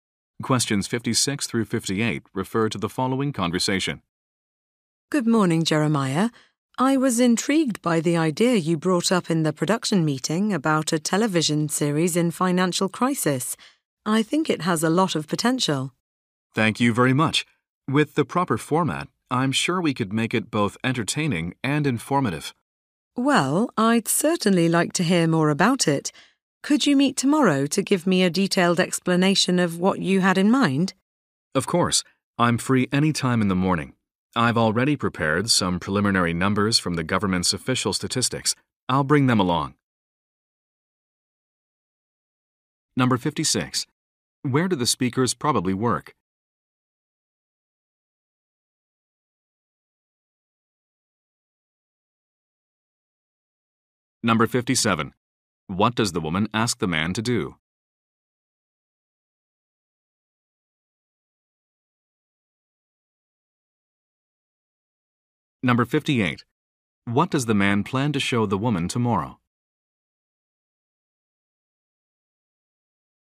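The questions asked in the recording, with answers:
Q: Where do the speakers probably work?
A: At a television production company

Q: What does the woman ask the man to do?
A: Meet tomorrow to explain his idea in detail

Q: What does the man plan to show the woman tomorrow?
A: Preliminary numbers from government statistics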